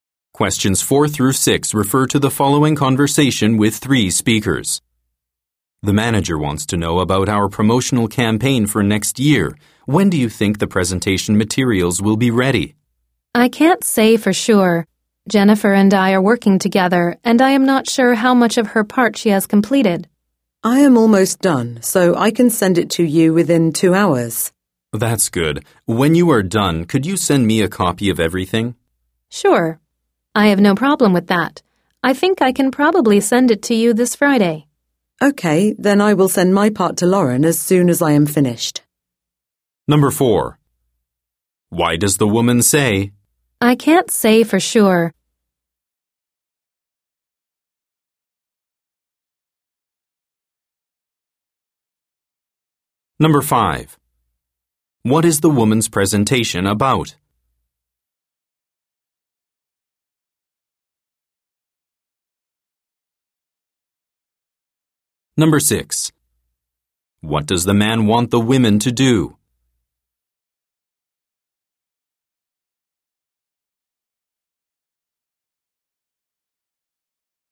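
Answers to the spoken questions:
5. The promotional campaign for next year.
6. Send him a copy of everything.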